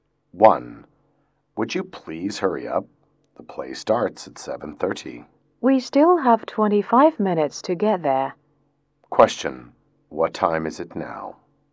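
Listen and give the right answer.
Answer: 7:05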